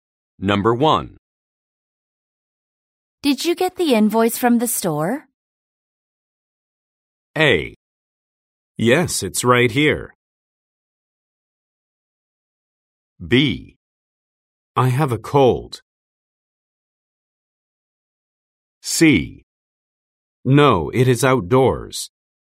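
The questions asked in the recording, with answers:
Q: Did you get the invoice from the store?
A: A: Yes, it's right here.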